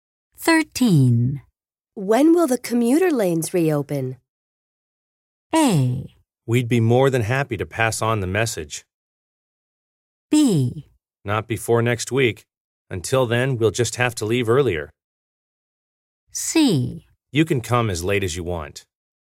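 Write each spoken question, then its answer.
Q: When will the commuter lanes reopen?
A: B: Not before next week. Until then, we'll just have to leave earlier.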